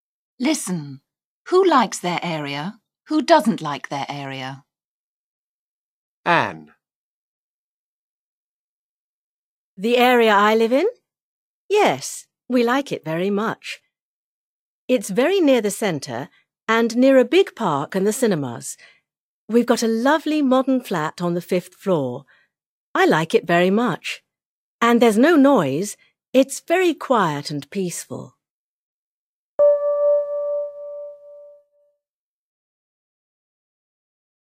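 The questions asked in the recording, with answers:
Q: Who likes their area?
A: Anne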